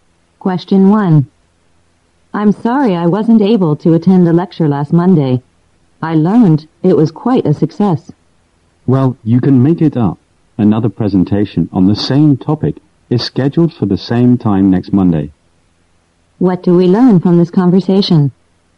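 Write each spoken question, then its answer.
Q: What do we learn from this conversation?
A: The speaker missed the lecture, but a repeat presentation is scheduled for next Monday at the same time.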